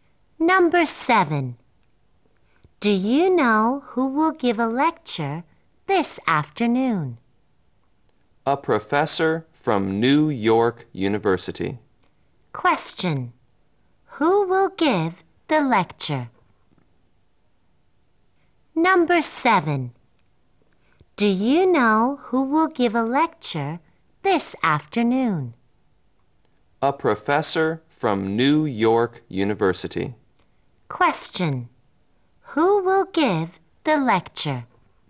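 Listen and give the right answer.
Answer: A professor from New York University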